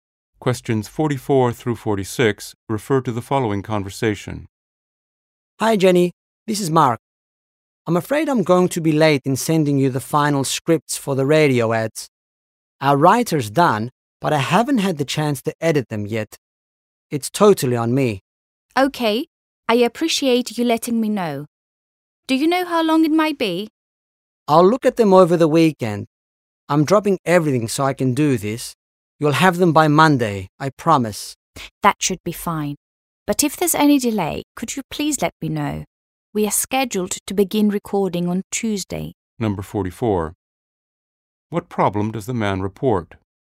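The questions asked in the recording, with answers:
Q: What problem does the man report?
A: The final radio ad scripts will be late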